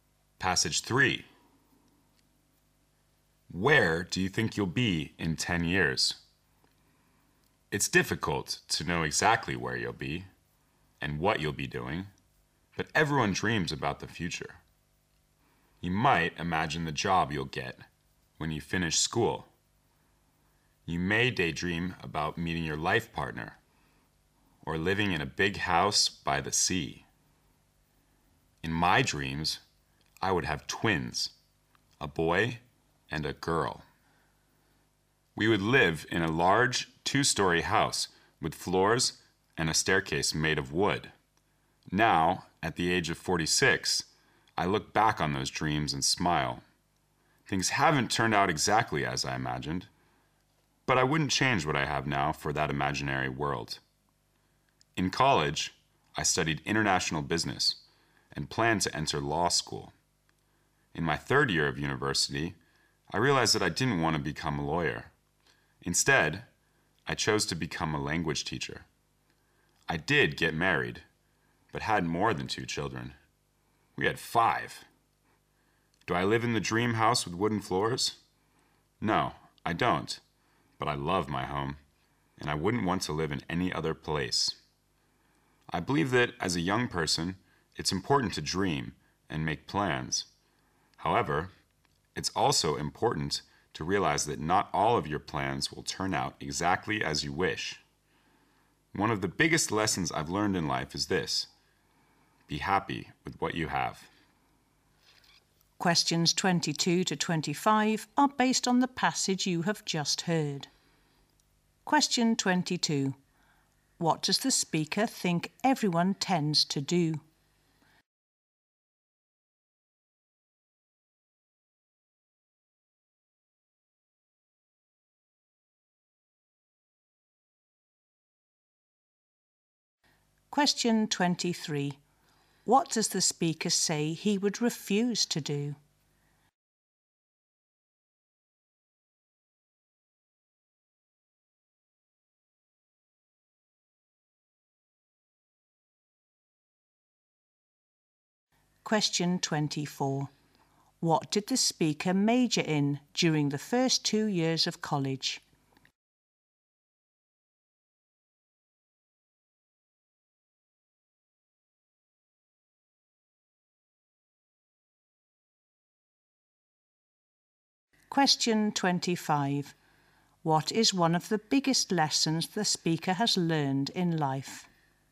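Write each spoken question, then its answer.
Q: What does the speaker think everyone tends to do?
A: Dream about the future

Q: What does the speaker say he would refuse to do?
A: Trade what he has now for his imaginary dream world

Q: What did the speaker major in during the first 2 years of college?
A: International business

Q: What is one of the biggest lessons the speaker has learned in life?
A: Be happy with what you have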